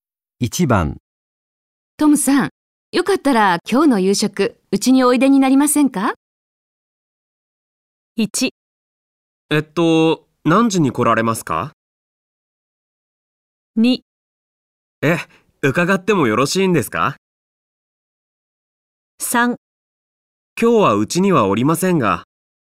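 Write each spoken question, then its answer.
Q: トムさん、よかったら今日の夕食、うちにおいでになりませんか?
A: 2: 伺ってもよろしいんですか?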